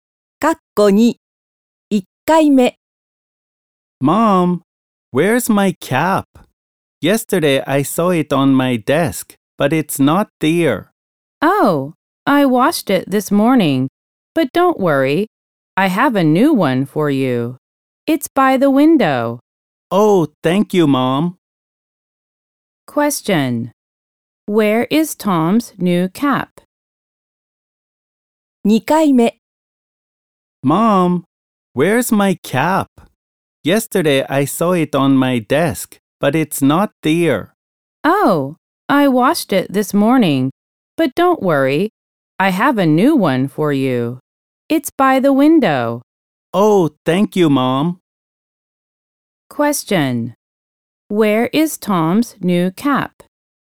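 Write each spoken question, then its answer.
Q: Where is Tom's new cap?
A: By the window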